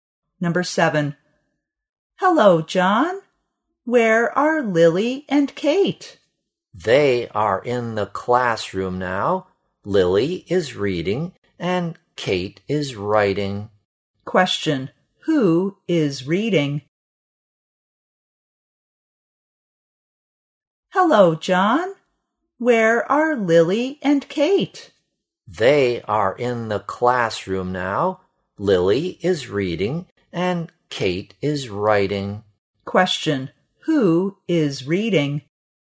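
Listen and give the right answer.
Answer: Lily.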